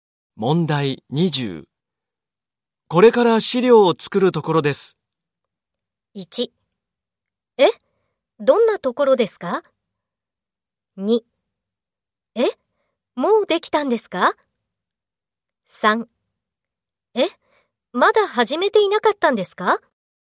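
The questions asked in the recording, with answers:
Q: これから資料を作るところです。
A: 3: え?まだ始めていなかったんですか?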